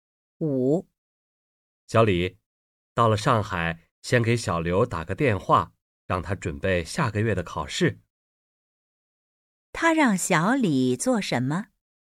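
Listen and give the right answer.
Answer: 到上海先给小刘打电话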